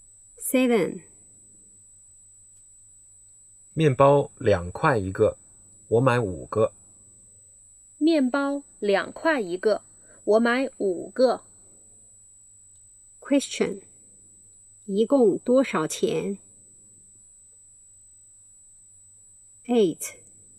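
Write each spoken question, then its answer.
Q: 一共多少钱?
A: 十块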